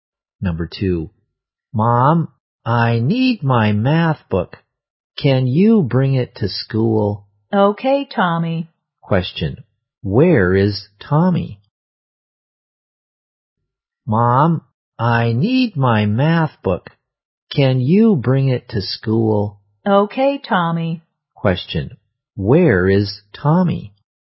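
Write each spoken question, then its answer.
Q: Question, where is Tommy?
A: At school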